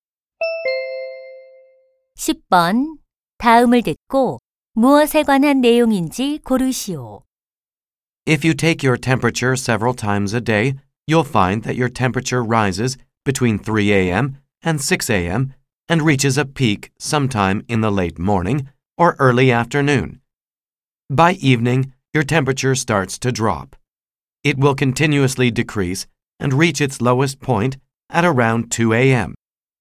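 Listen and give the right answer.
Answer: 하루 동안의 체온 변화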